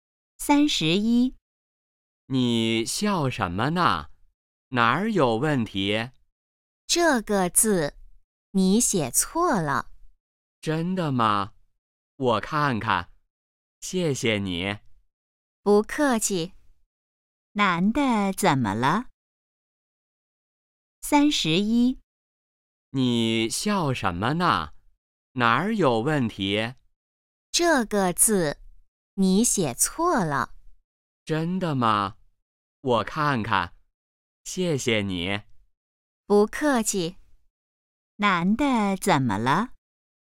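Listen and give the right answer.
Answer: 写错字了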